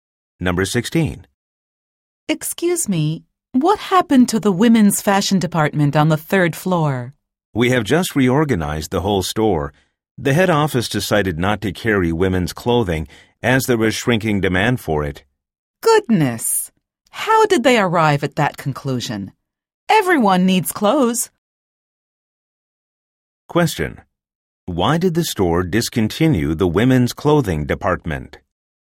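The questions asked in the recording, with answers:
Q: Why did the store discontinue the women's clothing department?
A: Demand for women's clothing was shrinking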